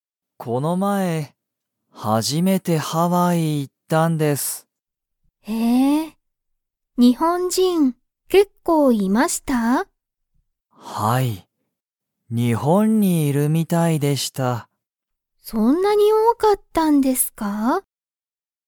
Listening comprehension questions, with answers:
ハワイに、日本人にほんじんは結構けっこういましたか?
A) はい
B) いいえ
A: A) はい

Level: Level 1

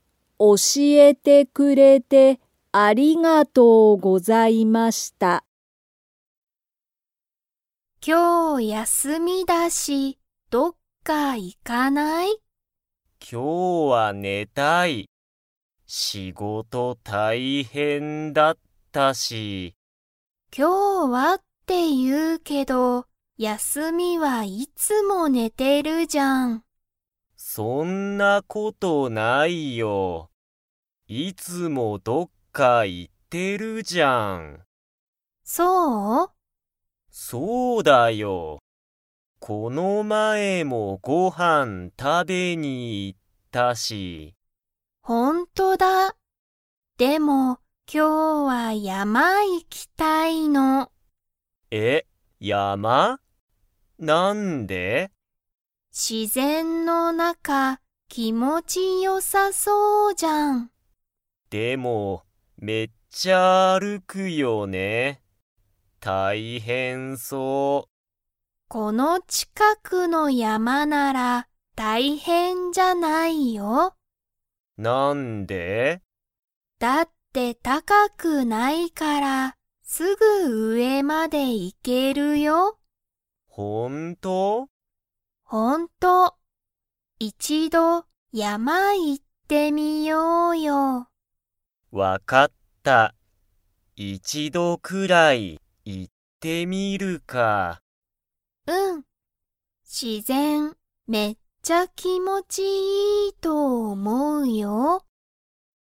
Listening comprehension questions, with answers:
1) この近(ちか)くの山(やま)は、____。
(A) 大変(たいへん)だ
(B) 気持(きも)ちよくない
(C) 高(たか)くない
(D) きれいだ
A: (C) 高(たか)くない

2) ミキとユウタは、近(ちか)くの山(やま)に行(い)きますか?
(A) はい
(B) いいえ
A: (A) はい

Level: Level 2

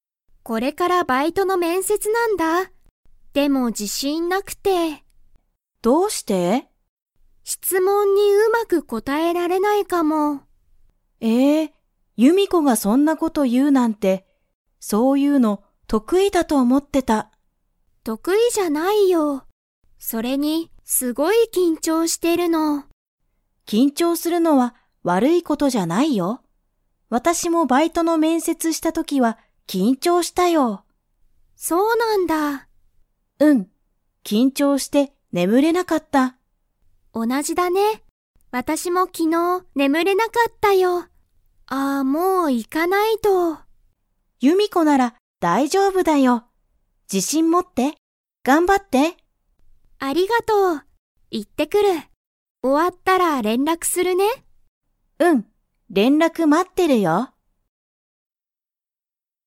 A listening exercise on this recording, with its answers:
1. ユミコは面接めんせつが 。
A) 得意とくいだ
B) 得意とくいじゃない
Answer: B) 得意とくいじゃない

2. ユミコは、面接めんせつが終おわったら何なにをしますか?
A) ユリに連絡れんらくする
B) 眠ねむる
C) バイトする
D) 勉強べんきょうする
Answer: A) ユリに連絡れんらくする

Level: Level 4

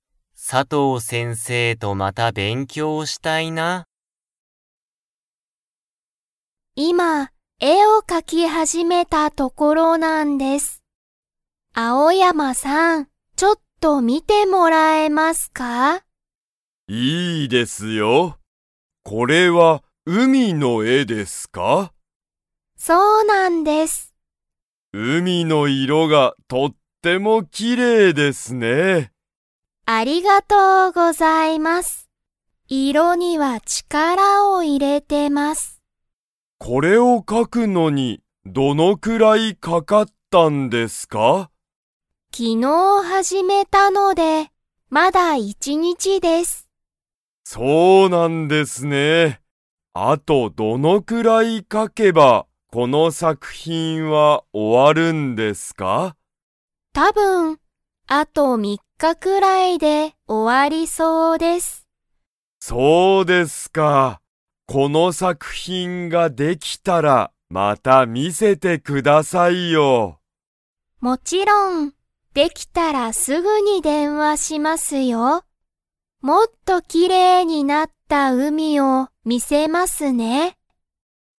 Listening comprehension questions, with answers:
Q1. 白田しろたさんは、何なんの絵えを描かいていますか?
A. 動物どうぶつ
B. 木き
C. 海うみ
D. 川かわ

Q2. あと1日にちで、作品さくひんは 。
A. 終おわる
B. 終おわらない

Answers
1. C. 海うみ
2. B. 終おわらない

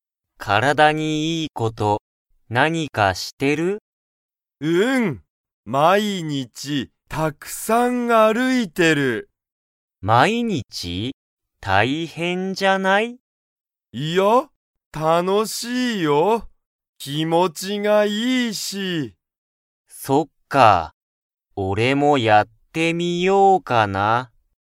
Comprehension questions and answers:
Comprehension Quiz (Skip if you don't understand the conversation yet)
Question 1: カイは、毎日(まいにち)、たくさん_____。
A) 勉強(べんきょう)してる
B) 仕事(しごと)してる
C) 写真(しゃしん)を撮(と)ってる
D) 歩(ある)いてる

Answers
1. D) 歩(ある)いてる

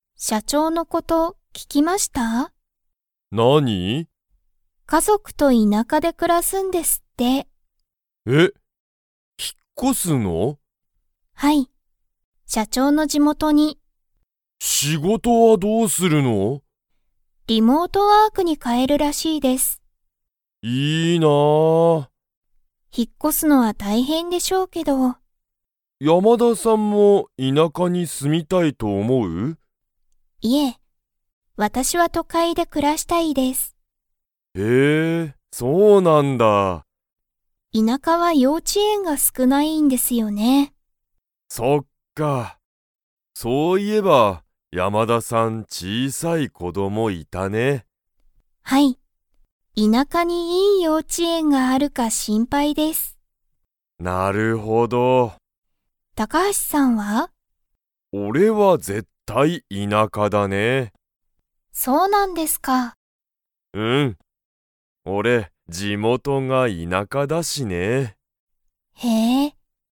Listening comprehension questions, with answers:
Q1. 誰だれが田舎いなかに引ひっ越こしますか?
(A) 山田やまださん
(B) 高橋たかはしさん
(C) 社長しゃちょう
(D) 社長しゃちょうの友達ともだち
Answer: (C) 社長しゃちょう

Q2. 山田やまださんは、都会とかいで 。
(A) 暮くらしたい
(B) 暮くらしたくない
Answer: (A) 暮くらしたい

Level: Level 4

